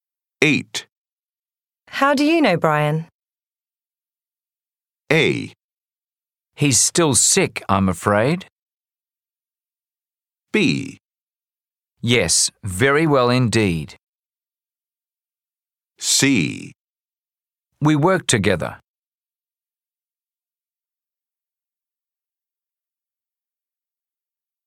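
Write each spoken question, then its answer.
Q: How do you know Brian?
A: C: We work together.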